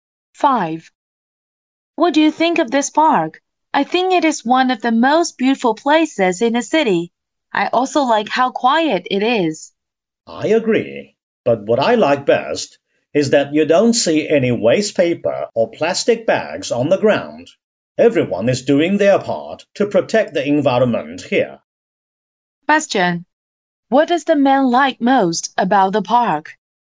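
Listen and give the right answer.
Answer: It is clean, with no litter on the ground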